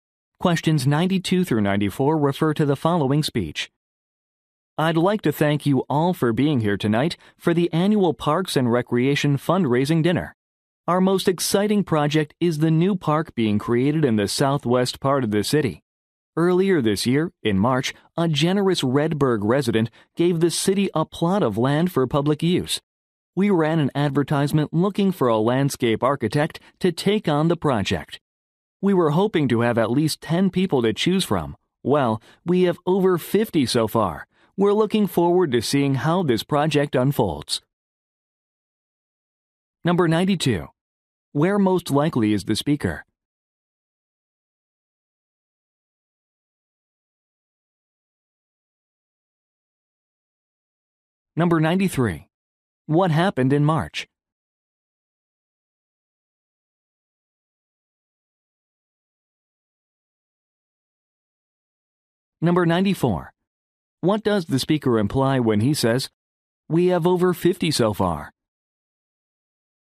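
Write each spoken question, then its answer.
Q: Where most likely is the speaker?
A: At a fundraising dinner

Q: What happened in March?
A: A resident donated land to the city

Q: What does the speaker imply when he says, "We have over 50 so far"?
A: More people applied than expected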